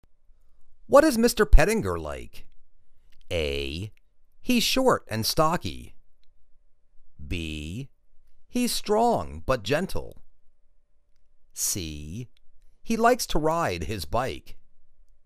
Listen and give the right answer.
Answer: He's strong but gentle.